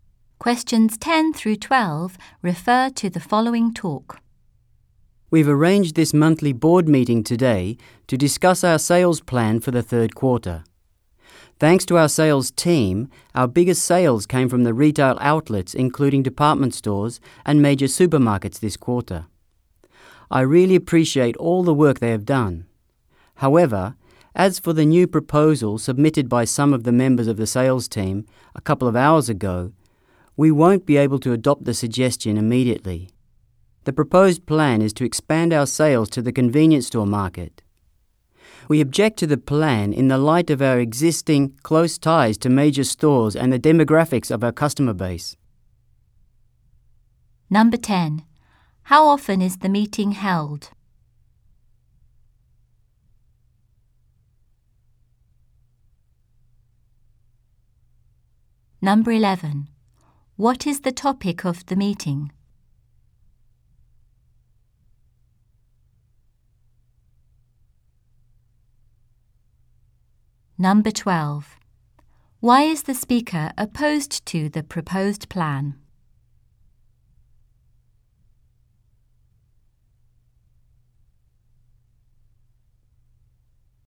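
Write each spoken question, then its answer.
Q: How often is the meeting held?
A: Monthly

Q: What is the topic of the meeting?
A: The sales plan for the third quarter

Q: Why is the speaker opposed to the proposed plan?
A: Because of the company's existing close ties to major stores and the demographics of its customer base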